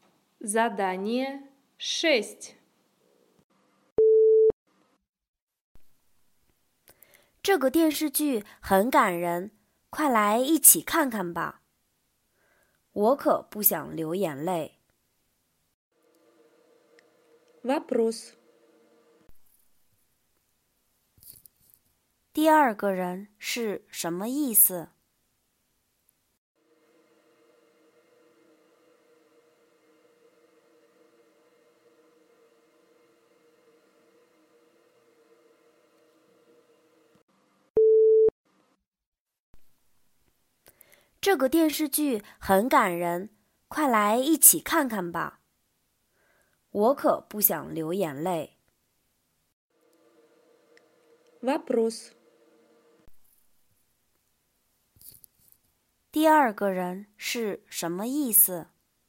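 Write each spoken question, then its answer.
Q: 第二个人是什么意思?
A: 不想看这个电视剧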